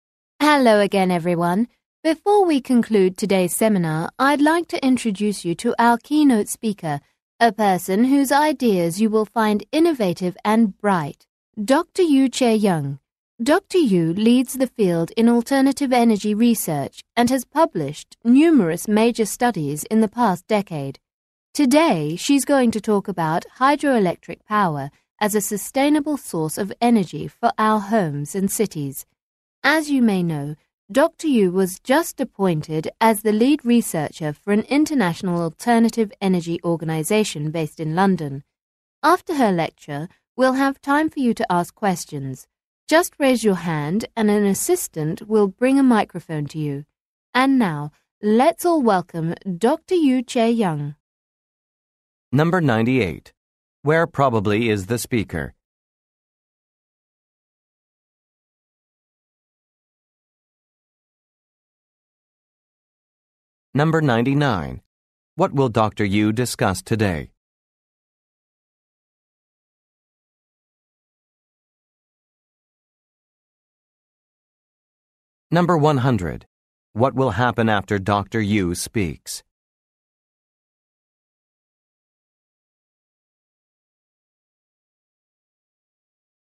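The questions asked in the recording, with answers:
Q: Where probably is the speaker?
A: At a seminar

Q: What will Dr. Yu discuss today?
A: Hydroelectric power as a sustainable energy source

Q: What will happen after Dr. Yu speaks?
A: Listeners can ask questions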